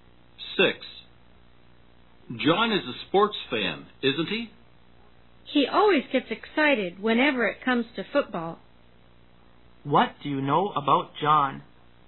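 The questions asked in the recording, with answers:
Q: What do you know about John?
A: He is a football fan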